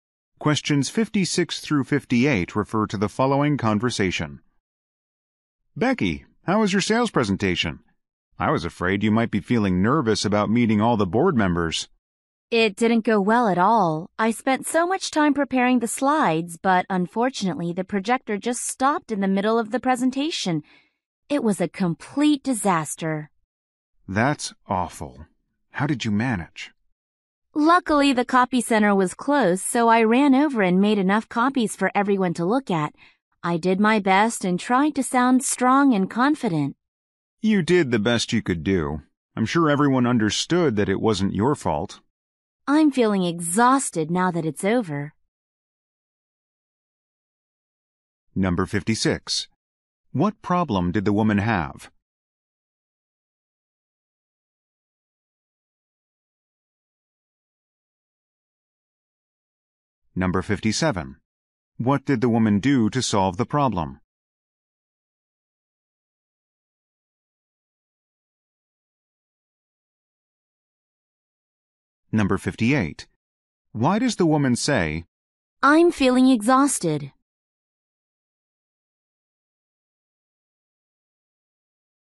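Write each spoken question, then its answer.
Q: What problem did the woman have?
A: The projector stopped during her presentation

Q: What did the woman do to solve the problem?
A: Made copies for everyone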